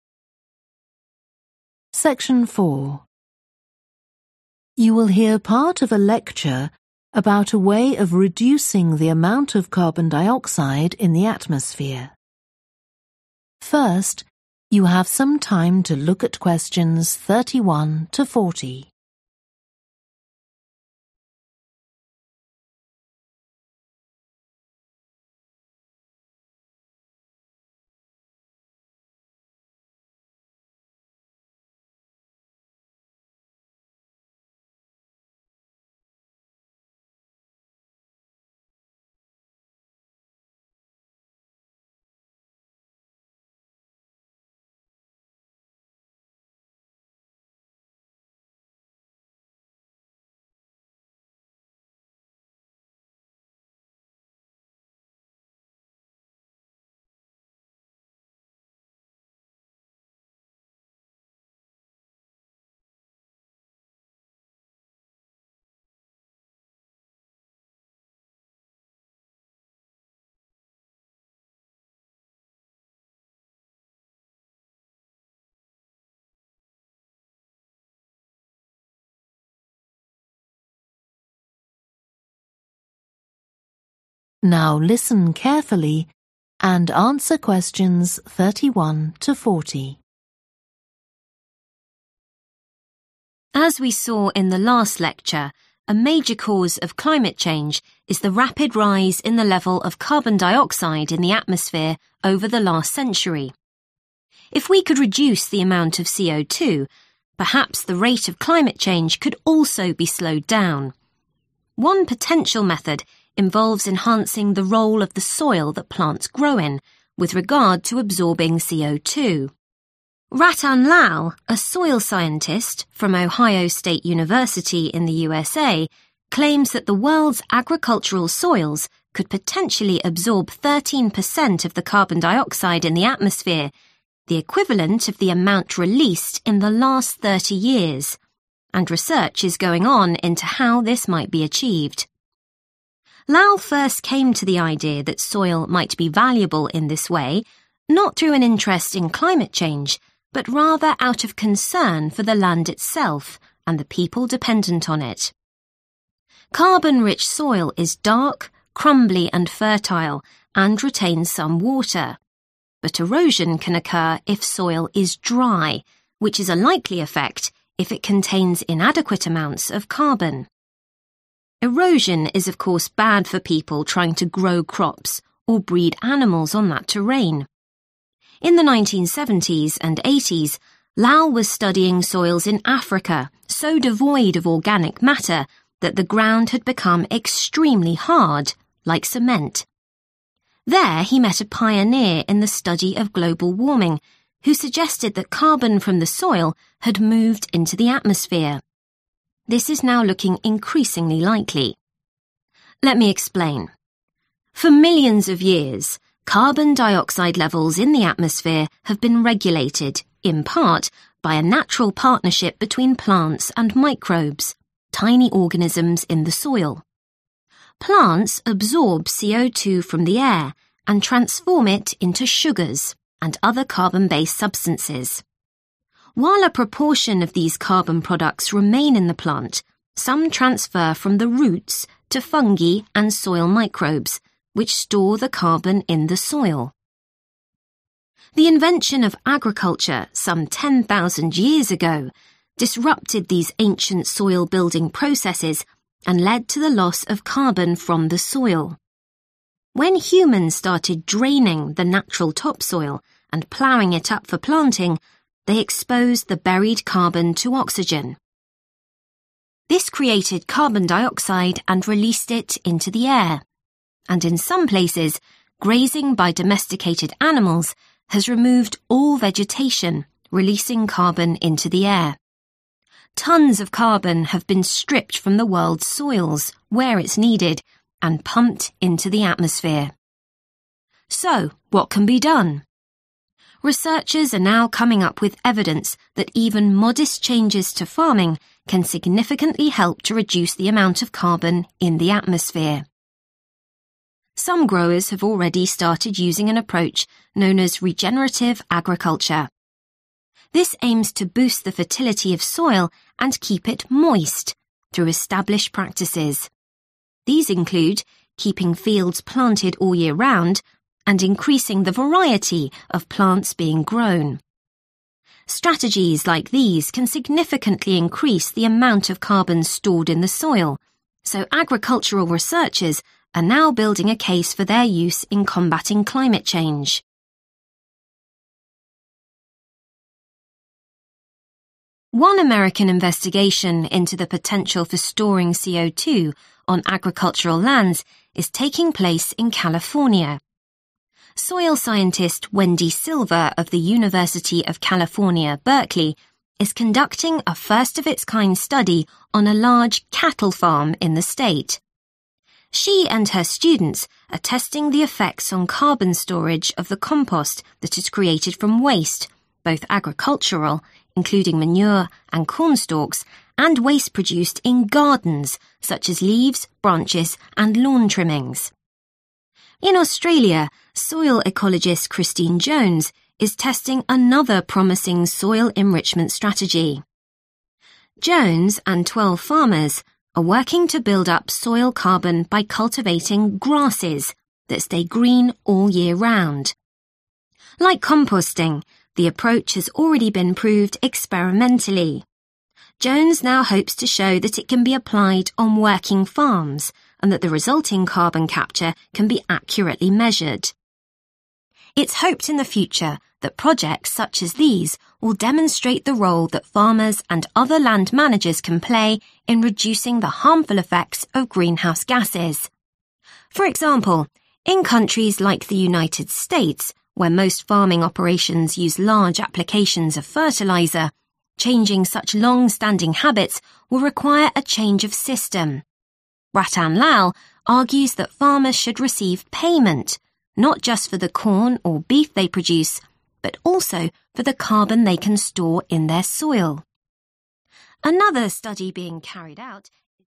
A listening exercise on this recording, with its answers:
Complete the notes below. Write ONE WORD ONLY for each answer.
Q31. Erosion is more likely in soil that is 31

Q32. Lai found soil in Africa that was very 32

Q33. plants turn CO2 from the air into carbon-based substances such as 33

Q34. some CO2 moves from the 34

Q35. uses established practices to make sure soil remains fertile and 35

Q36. e.g. through year-round planting and increasing the 36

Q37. taking place on a big 37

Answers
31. dry
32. hard
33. sugar
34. roots
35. moist
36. variety
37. cattle

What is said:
As we saw in the last lecture, a major cause of climate change is the rapid rise in the level of carbon dioxide in the atmosphere over the last century. If we could reduce the amount of CO2, perhaps the rate of climate change could also be slowed down. One potential method involves enhancing the role of the soil that plants grow in, with regard to absorbing CO2. Rattan Lal, a soil scientist from Ohio Stage University, in the USA, claims that the world's agricultural soils could potentially absorb 13 per cent of the carbon dioxide in the atmosphere – the equivalent of the amount released in the last 3o years. And research is going on into how this might be achieved.
Lal first came to the idea that soil might be valuable in this way not through an interest in climate change, but rather out of concern for the land itself and the people dependent on it. Carbon-rich soil is dark, crumbly and fertile, and retains some water. But (Q31) erosion can occur if soil is dry (có thể xảy ra xói mòn nếu đất khô hạn), which is a likely effect if it contains inadequate amounts of carbon. Erosion is of course bad for people trying to grow crops or breed animals on that terrain. There he met a pioneer in the study of global warming, who suggested that carbon from the soil had moved into the atmosphere. This is now looking increasingly likely.
Let me explain. For millions of years, carbon dioxide levels in the atmosphere have been regulated, in part, by a natural partnership between plants and microbes – tiny organisms in the soil. While a proportion of these carbon products remain in the plant, (Q34) some transfer from (= some CO2 moves from) the roots to fungi and soil microbes (= microbes in the soil) (một số chuyển từ rễ cây sang nấm và vi khuẩn trong đất), which store the carbon in the soil.
The invention of agriculture some 10,000 years ago disrupted these ancient soil-building processes and led to the loss of carbon from the soil. When humans started draining the natural topsoil, and ploughing it up for planting, they exposed the buried carbon to oxygen. This created carbon dioxide and released it into the air. And in some places, grazing by domesticated animals has removed all vegetation, releasing carbon into the air. Tons of carbon have been stripped from the world's soils – where it's needed – and pumped into the atmosphere.
So what can be done? Researchers are now coming up with evidence that even modest changes to farming can significantly help to reduce the amount of carbon in the atmosphere.
Some growers have already started using an approach known as regenerative agriculture. These include keeping fields planted all year round, (Q36) and increasing the variety of plants being grown (và tăng số lượng cây trồng). Strategies like these can significantly increase the amount of carbon stored in the soil, so agricultural researchers are now building a case for their use in combating climate change.
One American investigation into the potential for storing CO2 on agricultural lands is taking place in California. She and her students are testing the effects on carbon storage of the compost that is created from waste – both agricultural (= waste from agriculture), including manure and cornstalks, and (Q38) waste produced in gardens (chất thải trong vườn), such as leaves, branches, and lawn trimmings.
In Australia, soil ecologist Christine Jones is testing another promising soil-enrichment strategy. Jones and 12 farmers are (Q39) working to build up soil carbon (= to increase soil carbon) by cultivating grasses that stay green (= are always green) all year round (tích lũy carbon trong đất bằng cách trồng những loại cỏ xanh quanh năm). Like composting, the approach has already been proved experimentally; Jones now hopes to show that it can be applied on working farms and that the resulting carbon capture can be accurately measured.
It's hoped in the future that projects such as these will demonstrate the role that farmers and other land managers can play in reducing the harmful effects of greenhouse gases. For example, in countries like the United States, where most farming operations use large applications of fertiliser, changing such long-standing habits will require a change of system. Rattan Lal argues that (Q40) farmers should receive payment not just for the corn or beef they produce but also for the carbon they can store (= for carbon storage, as well as their produce) in their soil.